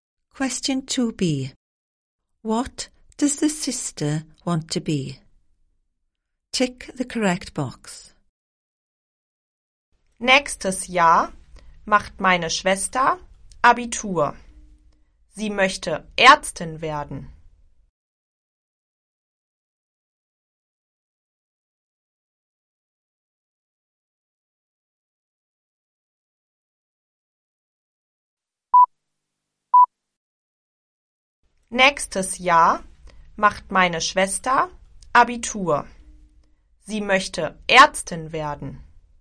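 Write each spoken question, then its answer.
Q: What does the sister want to be?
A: A doctor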